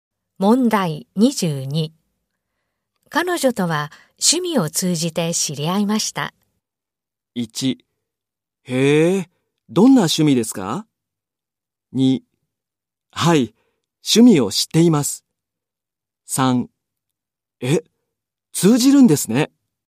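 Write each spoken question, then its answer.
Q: 彼女とは趣味を通じて知り合いました。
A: 1: へえ、どんな趣味ですか?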